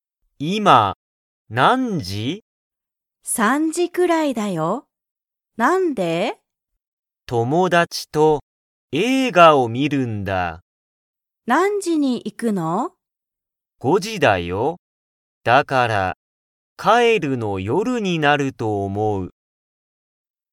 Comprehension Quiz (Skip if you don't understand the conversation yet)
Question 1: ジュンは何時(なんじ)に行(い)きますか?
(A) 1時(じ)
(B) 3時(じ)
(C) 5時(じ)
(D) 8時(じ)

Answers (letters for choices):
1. C